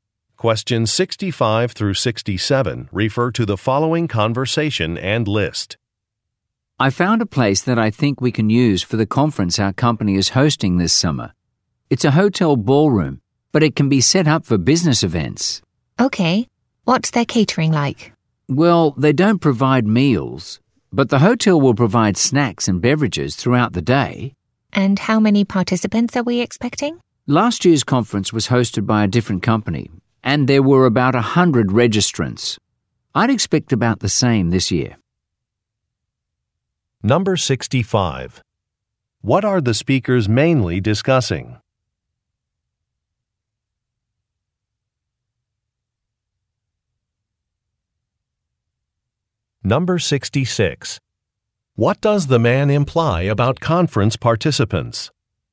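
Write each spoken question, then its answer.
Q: What are the speakers mainly discussing?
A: A venue for their company's summer conference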